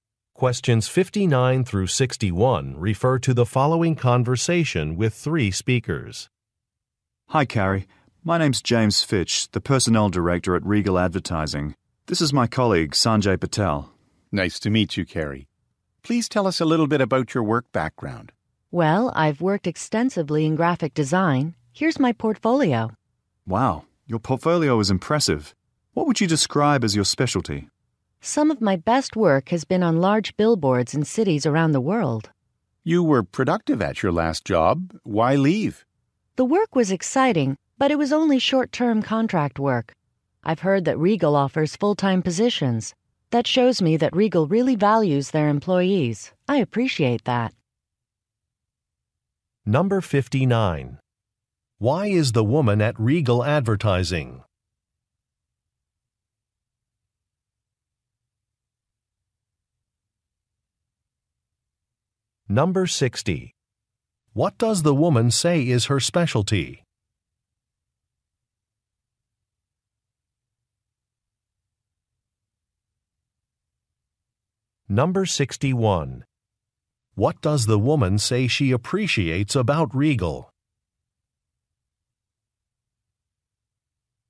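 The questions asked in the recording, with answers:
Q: Why is the woman at Regal Advertising?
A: For a job interview

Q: What does the woman say is her specialty?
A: Large billboards

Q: What does the woman say she appreciates about Regal?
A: It offers full-time positions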